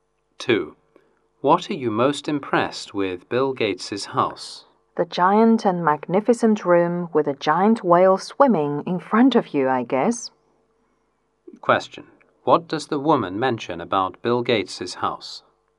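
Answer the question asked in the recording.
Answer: A giant, magnificent room with a giant whale swimming in front of you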